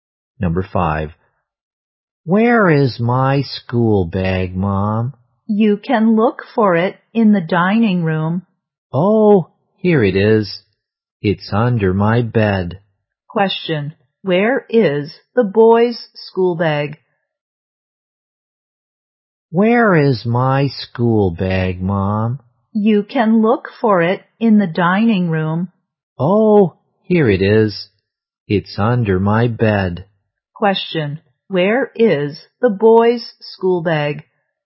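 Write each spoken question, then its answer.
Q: Question, where is the boy's school bag?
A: Under his bed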